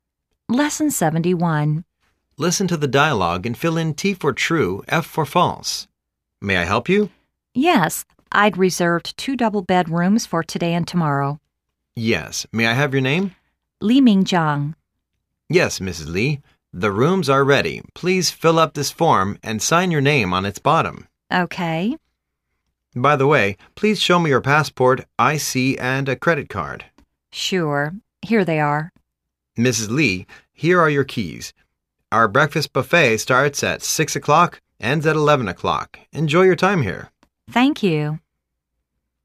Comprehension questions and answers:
Listen to the dialogue and fill in T for "True",F for "False".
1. He had a reservation for two days.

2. He reserved two single-bed rooms.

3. He should sign his name on the form he filled in.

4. Hotel's breakfast buffet is lasting for 5 hours.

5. He doesn't have any ID, passport or credit card for the receptionist.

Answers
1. True
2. False
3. True
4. True
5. False